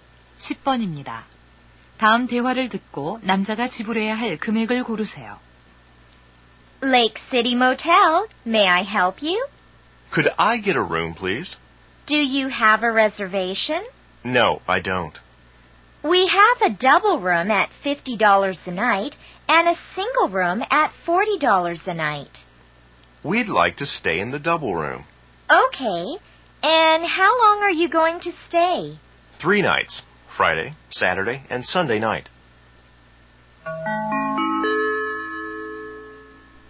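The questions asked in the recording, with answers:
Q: 다음 대화를 듣고 남자가 지불해야 할 금액을 고르세요.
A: 150달러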